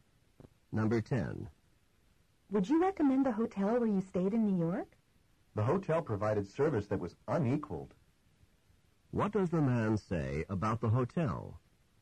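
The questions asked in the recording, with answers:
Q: What does the man say about the hotel?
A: Its service was excellent, better than any other.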